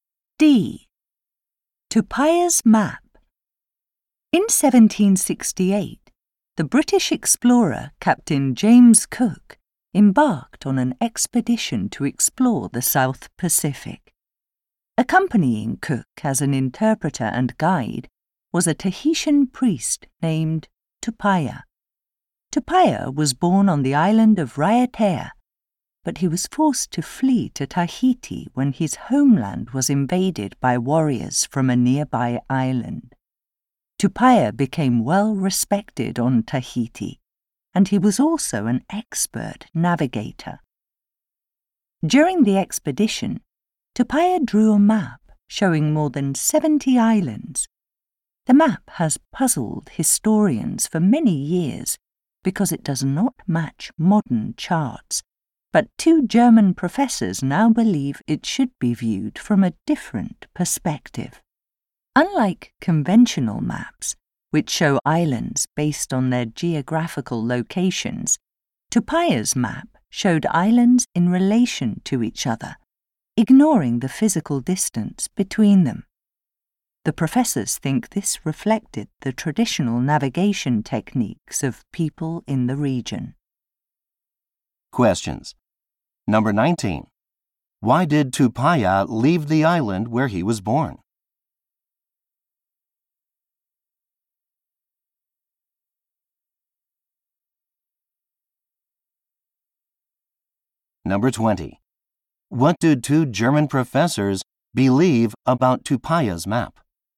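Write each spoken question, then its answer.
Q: Why did Tupaia leave the island where he was born?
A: Warriors from a nearby island invaded it

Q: What do two German professors believe about Tupaia's map?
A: It shows islands in relation to each other, not by physical distance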